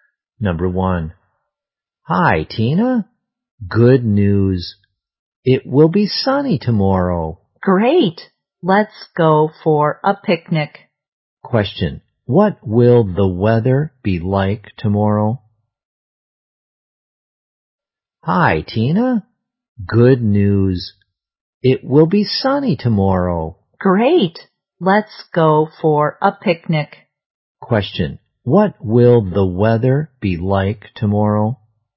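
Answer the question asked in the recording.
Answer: Sunny.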